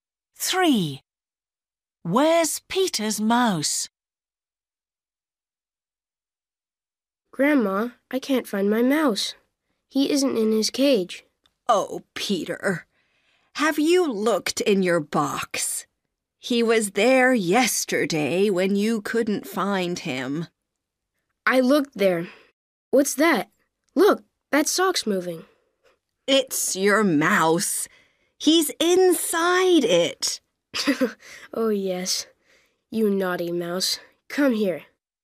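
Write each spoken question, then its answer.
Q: Where's Peter's mouse?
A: inside the sock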